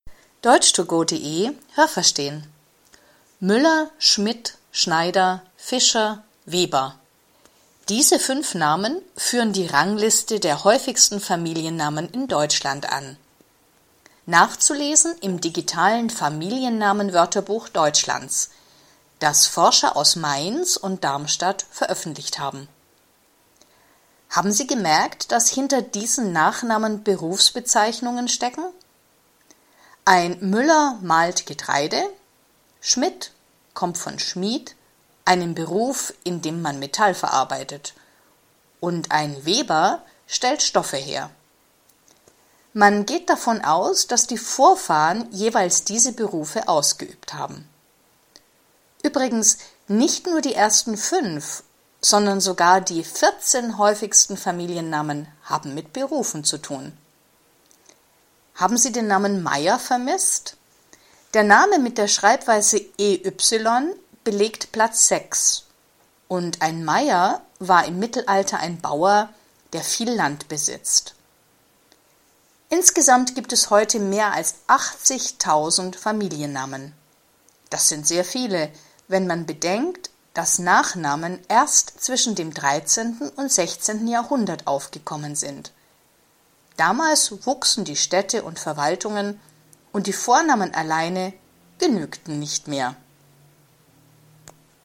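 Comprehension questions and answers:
Welche Präposition passt?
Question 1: _____ vielen Familiennamen verstecken sich Berufsbezeichnungen.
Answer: Hinter

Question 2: Der Name „Schmidt" kommt _____ Beruf Schmied.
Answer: vom

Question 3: Die häufigsten Familiennamen haben _____ Berufen zu tun.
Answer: mit

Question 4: Ein Meier war _____ Mittelalter ein Bauer, der viel Land besitzt.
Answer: im

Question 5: Familiennamen sind _____ dem 13. und 16. Jahrhundert aufgekommen.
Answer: zwischen

Was haben Sie gehört? Es gibt nur eine korrekte Antwort.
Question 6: Welcher Familienname ist in Deutschland am häufigsten?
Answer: Müller

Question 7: Müller, Schmidt, Schneider, Fischer, Weber – was bedeuten diese Familiennamen ursprünglich?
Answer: Berufe

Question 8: Wer arbeitet mit Metall?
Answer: der Schmied

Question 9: Wenn heute jemand mit Familiennamen „Müller" heißt, dann ...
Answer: haben seine Vorfahren wahrscheinlich als Müller gearbeitet

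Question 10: Welcher Familienname liegt auf Platz 6?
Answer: Meyer

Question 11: Heute gibt es in Deutschland mehr als _____ Familiennamen.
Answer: 80.000

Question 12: Vor dem 13. Jahrhundert hatten die Menschen in Deutschland ...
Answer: keine Nachnamen, nur Vornamen

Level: Hörtexte B (mittel)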